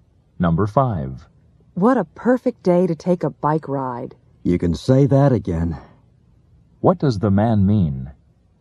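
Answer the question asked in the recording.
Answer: He agrees it's a perfect day for a bike ride.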